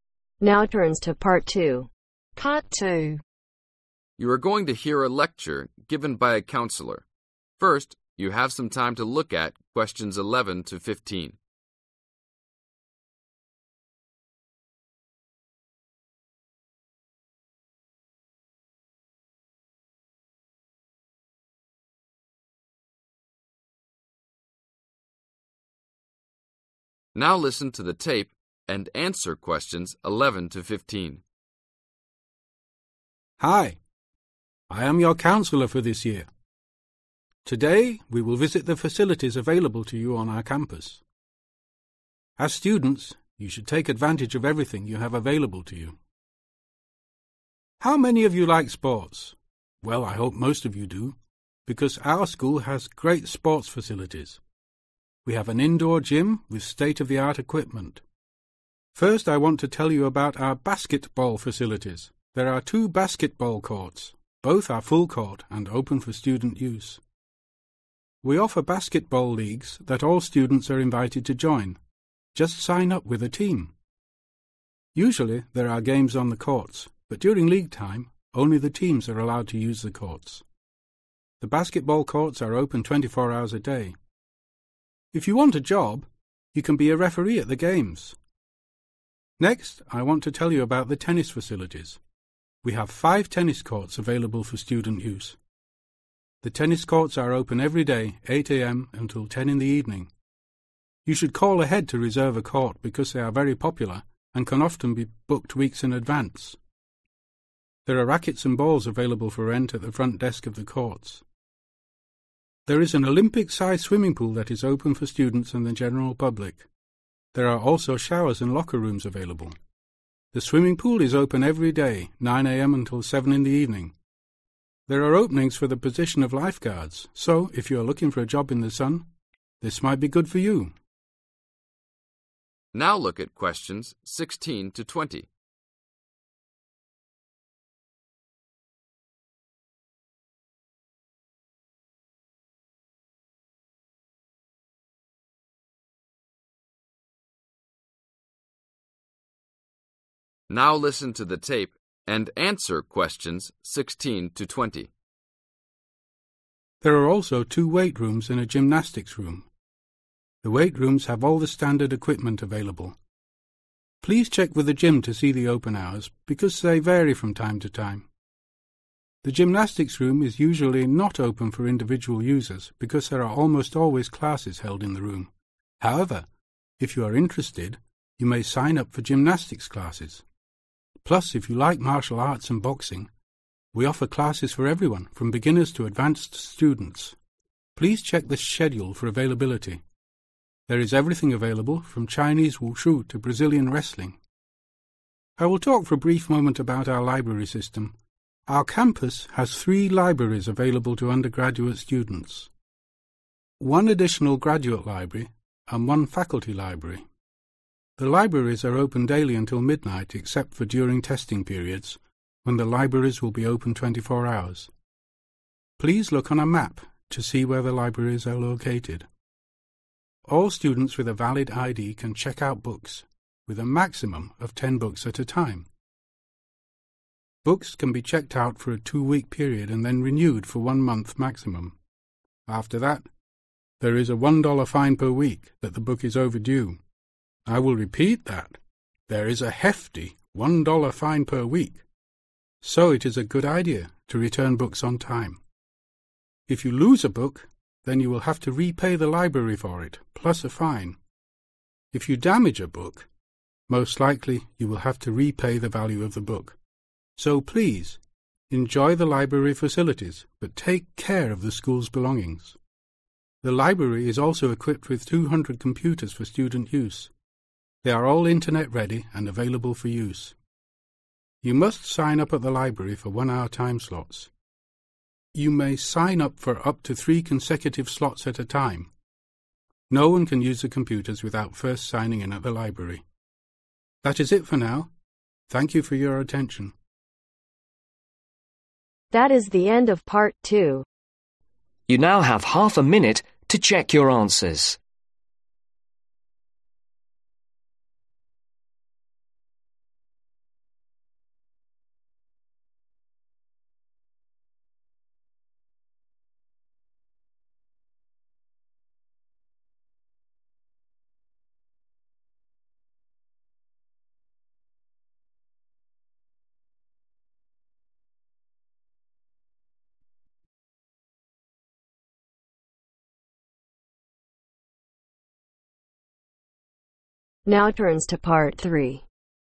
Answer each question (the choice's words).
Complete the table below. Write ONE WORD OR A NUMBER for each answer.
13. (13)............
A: 5

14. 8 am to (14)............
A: 10 pm

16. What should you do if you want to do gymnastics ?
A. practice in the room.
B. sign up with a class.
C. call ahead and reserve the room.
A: sign up with a class.

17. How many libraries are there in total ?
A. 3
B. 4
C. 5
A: 5

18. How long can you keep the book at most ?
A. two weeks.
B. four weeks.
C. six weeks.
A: six weeks.

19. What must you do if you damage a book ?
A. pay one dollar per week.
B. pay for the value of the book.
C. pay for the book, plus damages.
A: pay for the value of the book.

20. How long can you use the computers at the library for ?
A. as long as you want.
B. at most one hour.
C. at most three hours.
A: at most three hours.